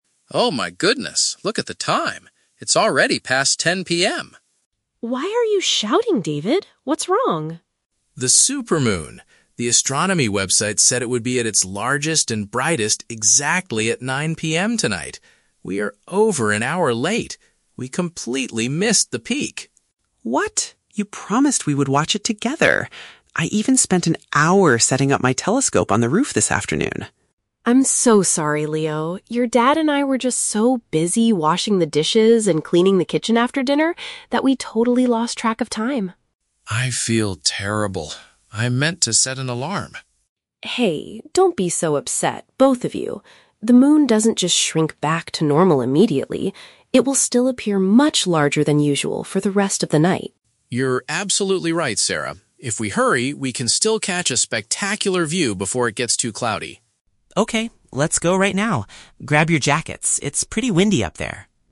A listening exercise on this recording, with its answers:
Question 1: Why is David suddenly panicking at the beginning of the conversation?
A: He realized they are late for a rare astronomical event.

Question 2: What is the main reason the family missed the best time to watch the moon?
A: They were occupied with doing some everyday household chores.

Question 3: How does Sarah try to reassure her husband and son?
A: By pointing out that the moon will still look incredibly impressive right now.

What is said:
David (Dad): Oh my goodness, look at the time! It's already past 10 PM!
Sarah (Mom): Why are you shouting, David? What's wrong?
David: The Supermoon! The astronomy website said it would be at its largest and brightest exactly at 9:00 PM tonight. We are over an hour late. We completely missed the peak!
Leo (Son): What? You promised we would watch it together! I even spent an hour setting up my telescope on the roof this afternoon.
Sarah: I'm so sorry, Leo. Your dad and I were just so busy washing the dishes and cleaning the kitchen after dinner that we totally lost track of time.
David: I feel terrible. I meant to set an alarm.
Sarah: Hey, don't be so upset, both of you. The moon doesn't just shrink back to normal immediately. It will still appear much larger than usual for the rest of the night.
David: You're absolutely right, Sarah. If we hurry, we can still catch a spectacular view before it gets too cloudy.